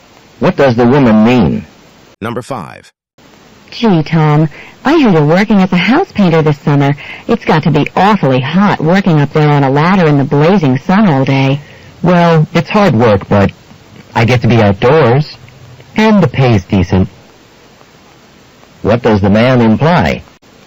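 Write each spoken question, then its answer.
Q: What does the man imply?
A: He likes the job despite the hard work.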